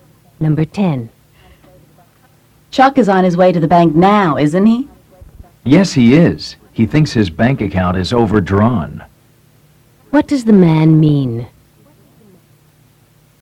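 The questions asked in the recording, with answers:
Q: What does the man mean?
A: Chuck thinks he has overdrawn his bank account.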